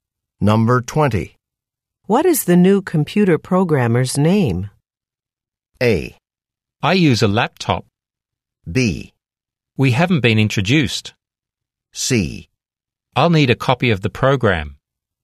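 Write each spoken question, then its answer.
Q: What is the new computer programmer's name?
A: B: We haven't been introduced.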